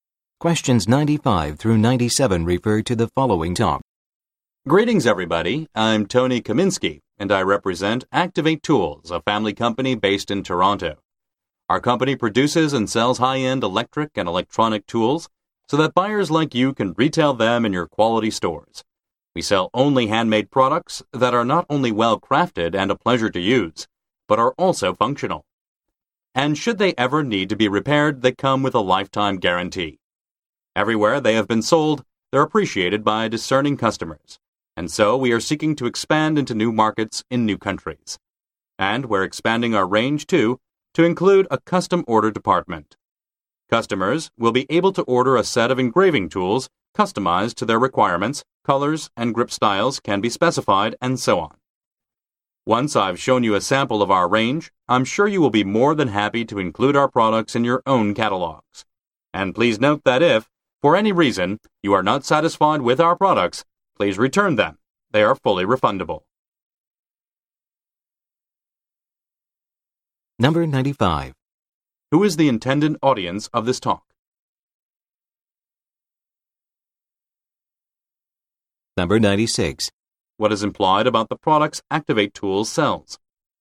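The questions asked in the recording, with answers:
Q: Who is the intended audience of this talk?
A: Retail buyers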